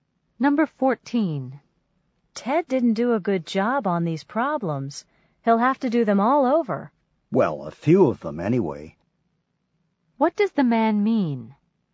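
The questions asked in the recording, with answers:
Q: What does the man mean?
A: Ted only has to redo some of the problems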